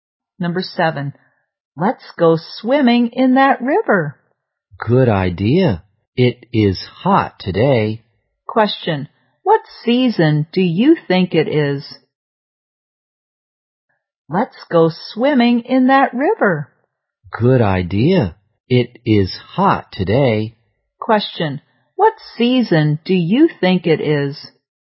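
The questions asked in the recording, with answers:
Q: what season do you think it is?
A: Summer.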